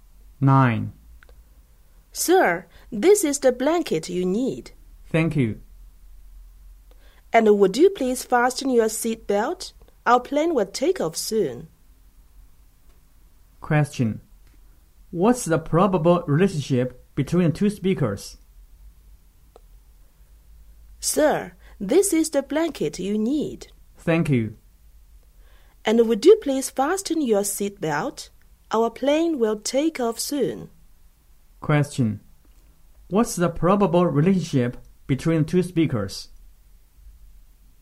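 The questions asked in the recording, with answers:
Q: What's the probable relationship between the two speakers?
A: Flight attendant and passenger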